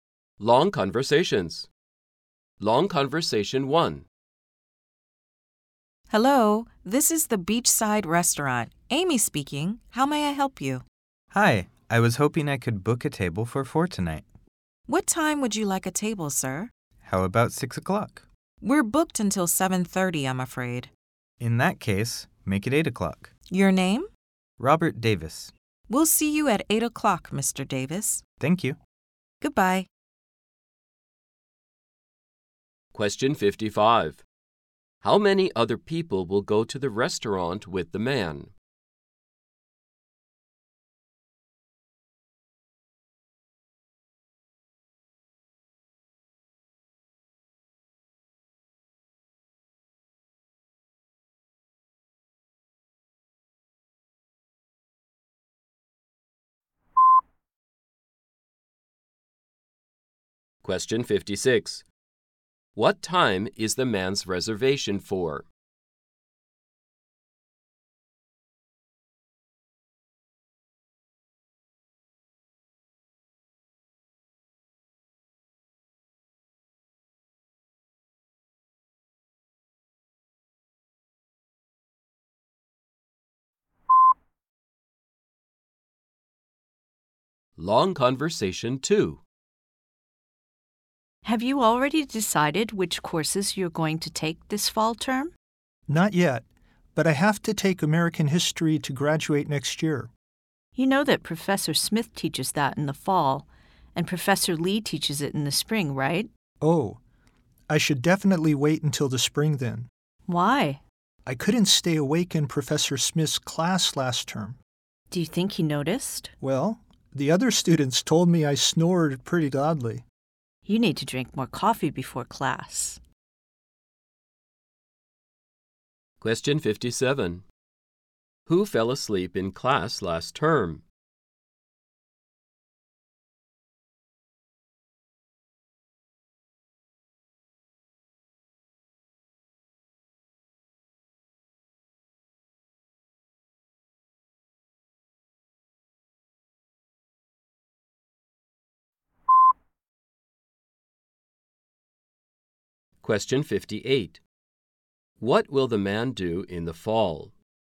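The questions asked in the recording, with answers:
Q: How many other people will go to the restaurant with the man?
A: Three

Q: What time is the man's reservation for?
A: 8 o'clock

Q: Who fell asleep in class last term?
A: The man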